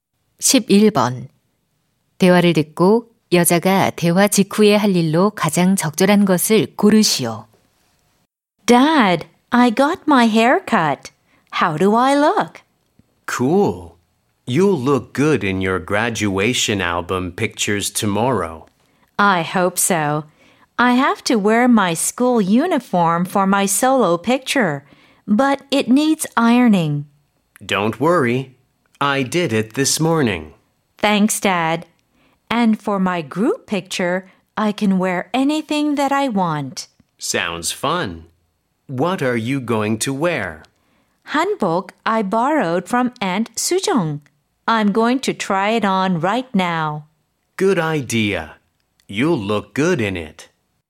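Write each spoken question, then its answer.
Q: 대화를 듣고 여자가 대화 직후에 할 일로 가장 적절한 것을 고르시오.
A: 한복 입어 보기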